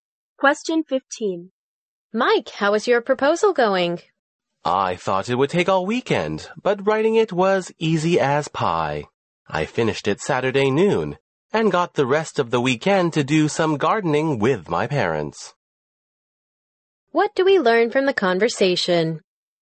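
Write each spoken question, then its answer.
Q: What do we learn from the conversation?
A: Mike finished his proposal easily by Saturday noon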